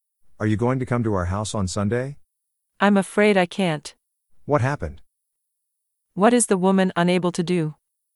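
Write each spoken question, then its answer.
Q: What is the woman unable to do?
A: Come to their house on Sunday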